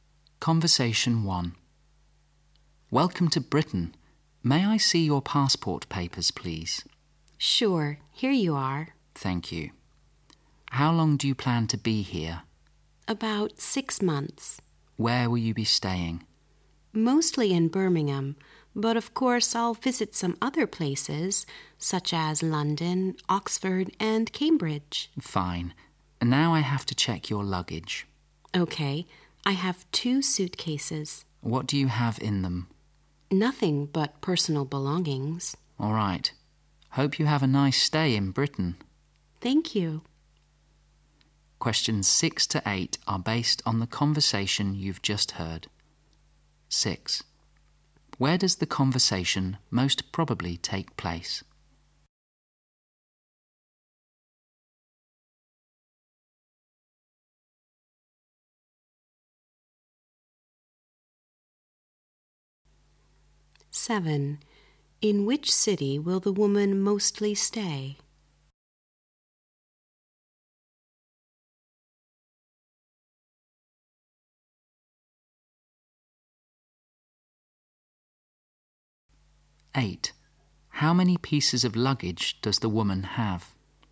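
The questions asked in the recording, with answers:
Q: Where does the conversation most probably take place?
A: At customs at a British airport.

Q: In which city will the woman mostly stay?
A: Birmingham

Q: How many pieces of luggage does the woman have?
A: Two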